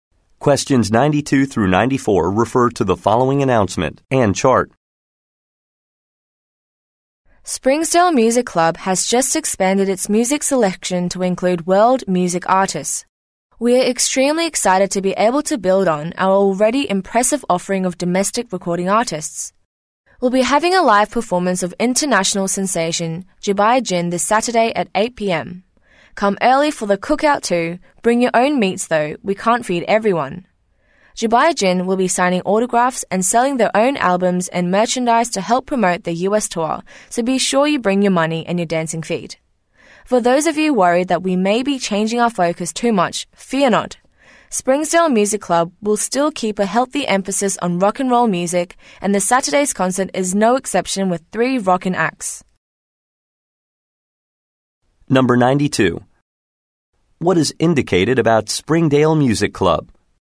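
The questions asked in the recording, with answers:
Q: What is indicated about Springdale Music Club?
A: It has expanded its selection to include world music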